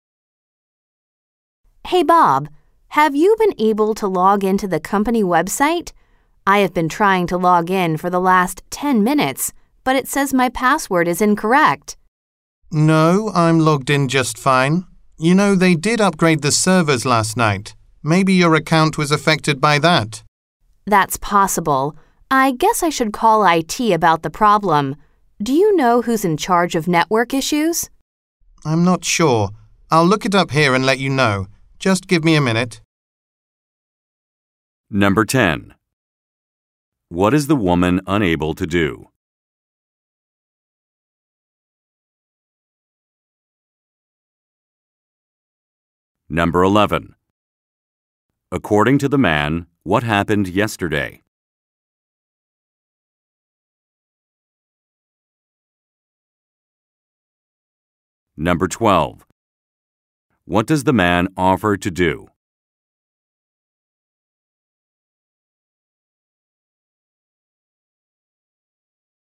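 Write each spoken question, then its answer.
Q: What is the woman unable to do?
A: Log into the company website

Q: According to the man, what happened yesterday?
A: The servers were upgraded

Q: What does the man offer to do?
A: Find out who is in charge of network issues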